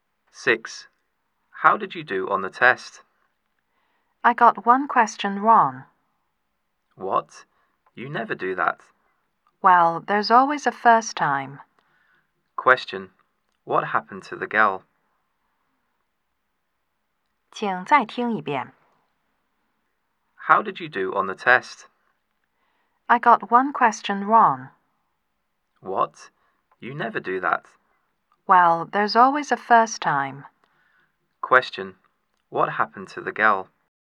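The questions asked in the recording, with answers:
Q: What happened to the girl?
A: She got one question wrong on the test.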